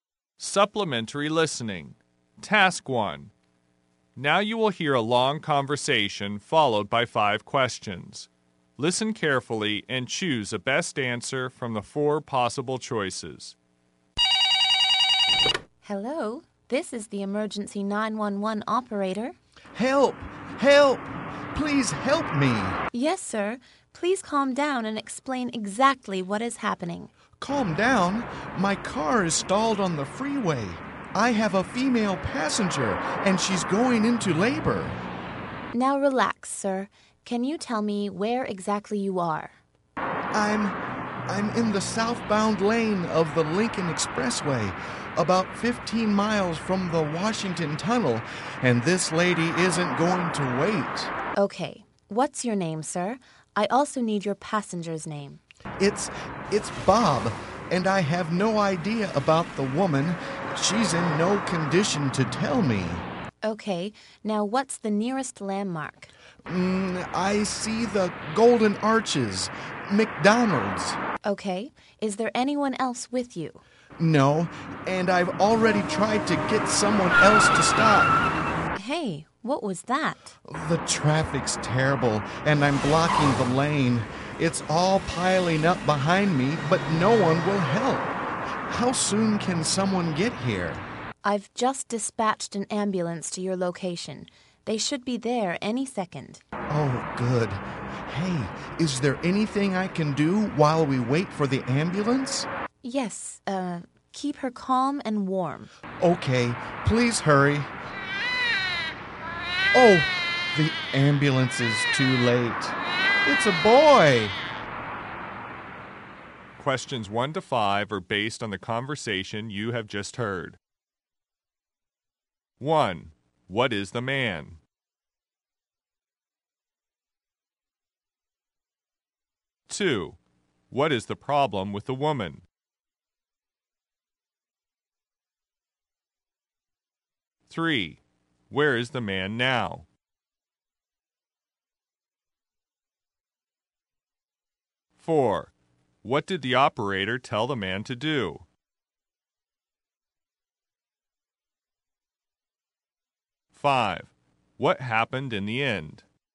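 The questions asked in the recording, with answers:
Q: What is the problem with the woman?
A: She is going into labor

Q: Where is the man now?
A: In the southbound lane of the Lincoln Expressway, about 15 miles from the Washington Tunnel

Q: What did the operator tell the man to do?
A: Keep her calm and warm

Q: What happened in the end?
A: The baby boy was born before the ambulance arrived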